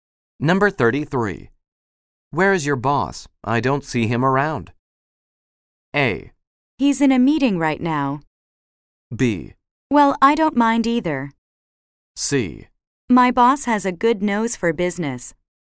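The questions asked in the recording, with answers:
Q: Where is your boss?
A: A: He's in a meeting right now.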